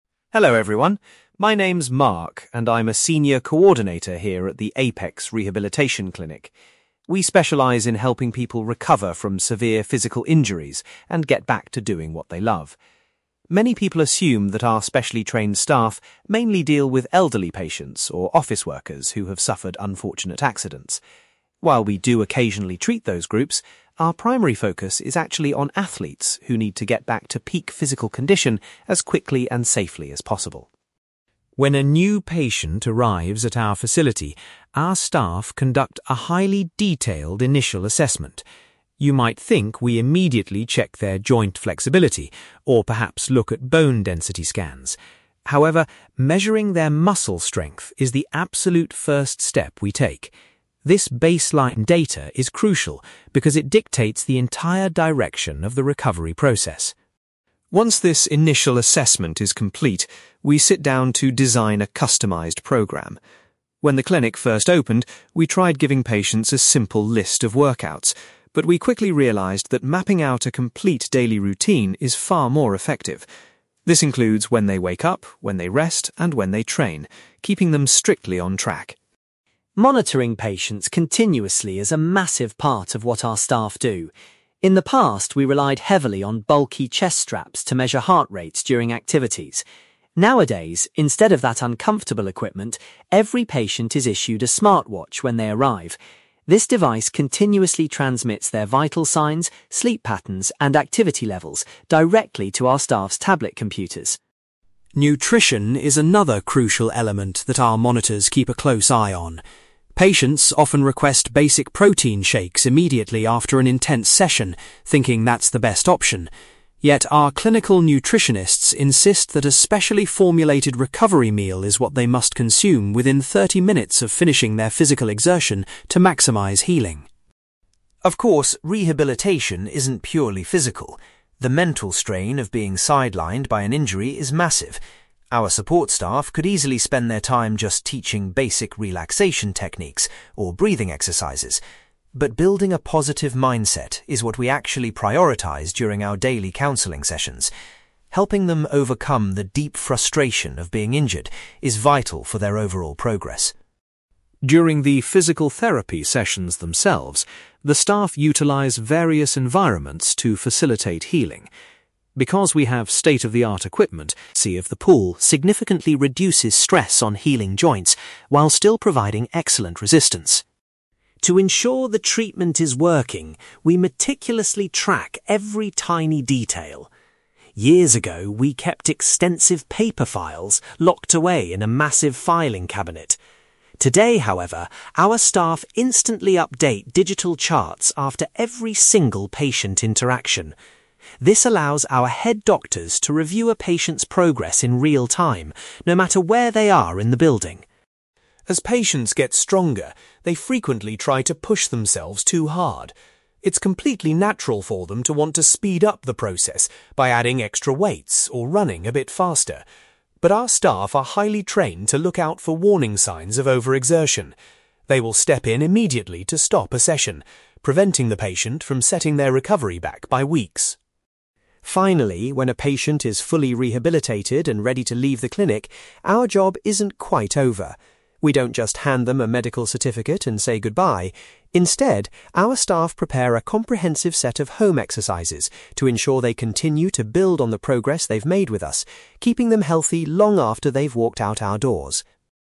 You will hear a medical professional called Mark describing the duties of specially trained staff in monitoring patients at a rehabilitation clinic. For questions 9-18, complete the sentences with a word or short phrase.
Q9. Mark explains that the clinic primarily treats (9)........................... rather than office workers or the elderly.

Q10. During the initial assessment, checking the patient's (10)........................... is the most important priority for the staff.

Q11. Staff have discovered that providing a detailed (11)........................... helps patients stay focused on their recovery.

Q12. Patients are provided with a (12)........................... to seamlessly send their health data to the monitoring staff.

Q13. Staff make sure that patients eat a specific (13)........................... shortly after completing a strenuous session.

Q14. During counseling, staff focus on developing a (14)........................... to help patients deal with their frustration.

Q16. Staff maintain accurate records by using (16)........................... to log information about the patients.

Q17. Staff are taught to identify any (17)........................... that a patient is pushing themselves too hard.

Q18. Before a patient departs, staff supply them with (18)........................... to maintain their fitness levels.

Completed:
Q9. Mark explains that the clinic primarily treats athletes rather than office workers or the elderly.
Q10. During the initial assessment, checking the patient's muscle strength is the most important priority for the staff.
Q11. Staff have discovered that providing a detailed daily routine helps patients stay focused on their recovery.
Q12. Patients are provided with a smart watch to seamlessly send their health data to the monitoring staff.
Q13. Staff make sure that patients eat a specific recovery meal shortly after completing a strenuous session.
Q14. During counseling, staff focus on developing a positive mindset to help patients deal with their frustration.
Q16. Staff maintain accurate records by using digital charts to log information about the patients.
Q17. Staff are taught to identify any warning signs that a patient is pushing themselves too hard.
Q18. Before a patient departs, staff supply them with home exercises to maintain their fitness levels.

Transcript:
Mark: Hello everyone. My name is Mark, and I'm a senior coordinator here at the Apex Rehabilitation Clinic. We specialize in helping people recover from severe physical injuries and get back to doing what they love. Many people assume that our specially trained staff mainly deal with elderly patients or office workers who have suffered unfortunate accidents. While we do occasionally treat those groups, our primary focus is actually on athletes who need to get back to peak physical condition as quickly and safely as possible.
When a new patient arrives at our facility, our staff conduct a highly detailed initial assessment. You might think we immediately check their joint flexibility or perhaps look at bone density scans. However, measuring their muscle strength is the absolute first step we take. This baseline data is crucial because it dictates the entire direction of the recovery process.
Once this initial assessment is complete, we sit down to design a customized program. When the clinic first opened, we tried giving patients a simple list of workouts. But we quickly realized that mapping out a complete daily routine is far more effective. This includes when they wake up, when they rest, and when they train, keeping them strictly on track.
Monitoring patients continuously is a massive part of what our staff do. In the past, we relied heavily on bulky chest straps to measure heart rates during activities. Nowadays, instead of that uncomfortable equipment, every patient is issued a smart watch when they arrive. This device continuously transmits their vital signs, sleep patterns, and activity levels directly to our staff's tablet computers.
Nutrition is another crucial element that our monitors keep a close eye on. Patients often request basic protein shakes immediately after an intense session, thinking that's the best option. Yet, our clinical nutritionists insist that a specially formulated recovery meal is what they must consume within thirty minutes of finishing their physical exertion to maximize healing.
Of course, rehabilitation isn't purely physical. The mental strain of being sidelined by an injury is massive. Our support staff could easily spend their time just teaching basic relaxation techniques or breathing exercises. But building a positive mindset is what we actually prioritize during our daily counseling sessions. Helping them overcome the deep frustration of being injured is vital for their overall progress.
During the physical therapy sessions themselves, the staff utilize various environments to facilitate healing. Because we have state-of-the-art equipment, many people assume we spend most of our time in the conventional gym. The buoyancy of the pool significantly reduces stress on healing joints while still providing excellent resistance.
To ensure the treatment is working, we meticulously track every tiny detail. Years ago, we kept extensive paper files locked away in a massive filing cabinet. Today, however, our staff instantly update digital charts after every single patient interaction. This allows our head doctors to review a patient's progress in real-time, no matter where they are in the building.
As patients get stronger, they frequently try to push themselves too hard. It's completely natural for them to want to speed up the process by adding extra weights or running a bit faster. But our staff are highly trained to look out for warning signs of overexertion. They will step in immediately to stop a session, preventing the patient from setting their recovery back by weeks.
Finally, when a patient is fully rehabilitated and ready to leave the clinic, our job isn't quite over. We don't just hand them a medical certificate and say goodbye. Instead, our staff prepare a comprehensive set of home exercises to ensure they continue to build on the progress they've made with us, keeping them healthy long after they've walked out our doors.

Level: B2